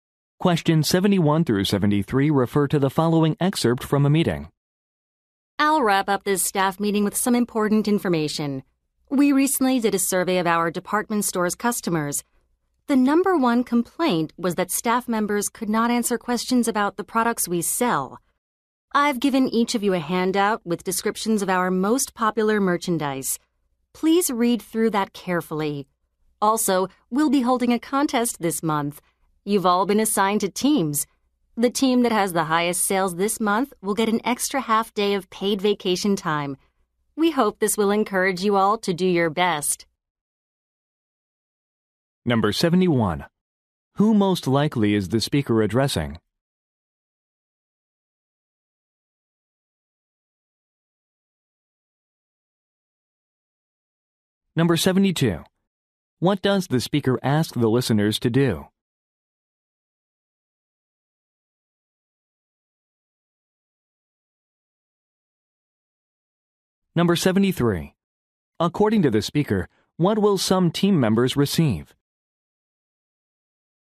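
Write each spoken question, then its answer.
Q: Who most likely is the speaker addressing?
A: Department store staff members

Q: What does the speaker ask the listeners to do?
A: Read a handout about popular merchandise carefully

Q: According to the speaker, what will some team members receive?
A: An extra half day of paid vacation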